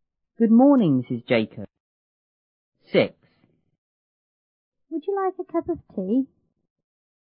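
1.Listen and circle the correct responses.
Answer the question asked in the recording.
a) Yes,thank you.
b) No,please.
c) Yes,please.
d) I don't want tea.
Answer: c) Yes,please.

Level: 初中英语广州版1B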